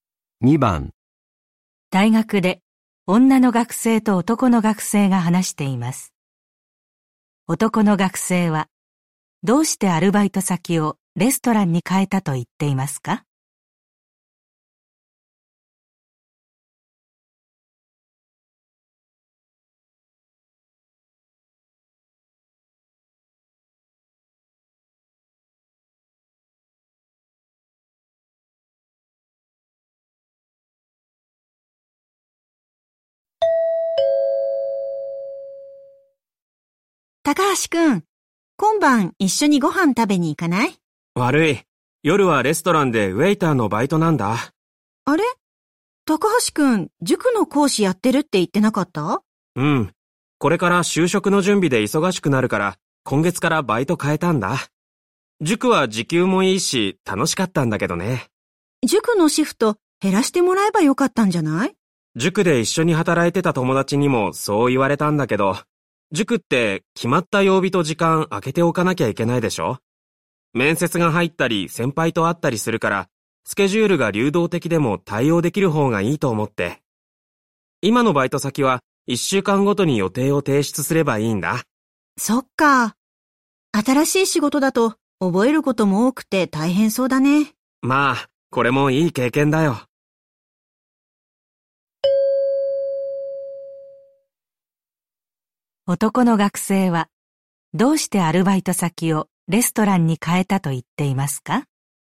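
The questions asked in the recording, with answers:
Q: 男の学生はどうしてアルバイト先をレストランに変えたと言っていますか?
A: スケジュールが流動的でも対応できるから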